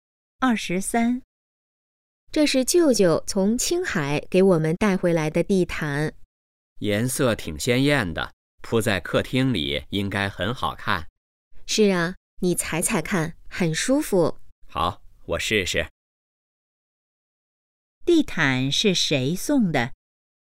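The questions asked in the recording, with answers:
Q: 地毯是谁送的?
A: 舅舅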